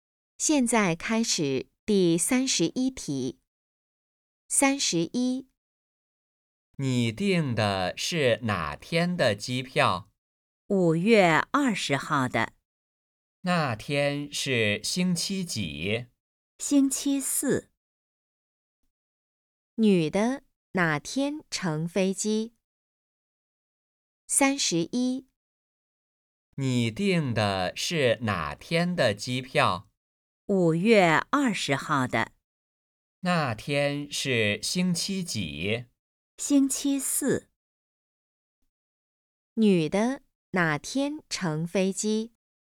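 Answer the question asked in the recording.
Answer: 5月20号,星期四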